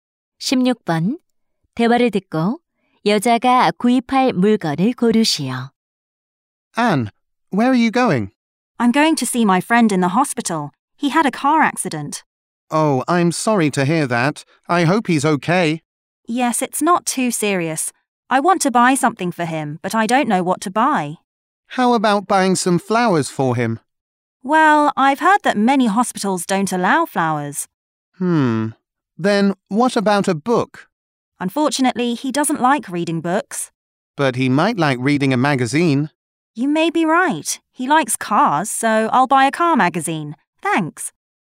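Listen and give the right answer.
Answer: 자동차 잡지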